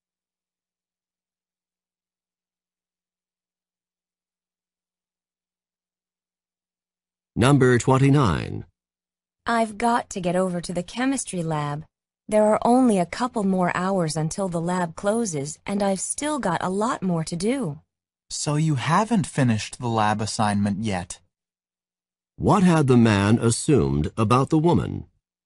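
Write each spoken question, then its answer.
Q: What had the man assumed about the woman?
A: That she had finished the lab assignment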